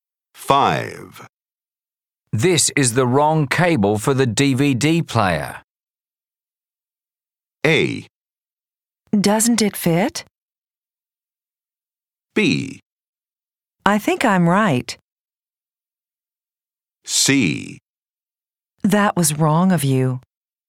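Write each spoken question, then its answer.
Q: This is the wrong cable for the DVD player.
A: A: Doesn't it fit?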